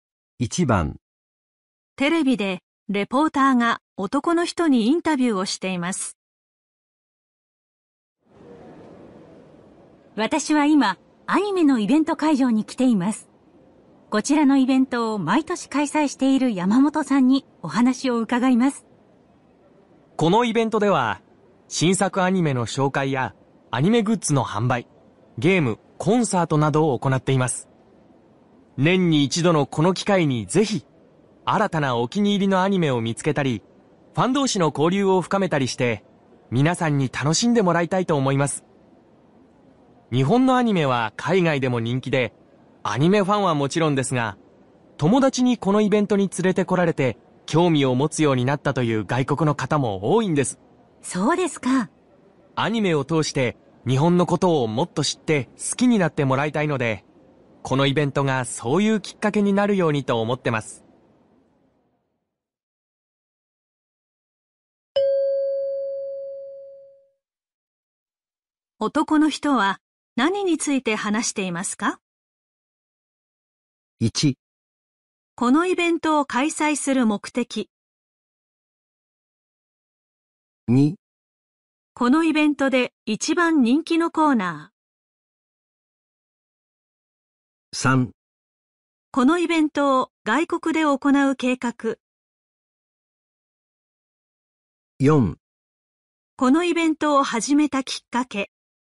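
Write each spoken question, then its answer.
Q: 男の人は何について話していますか?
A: 1: このイベントを開催する目的。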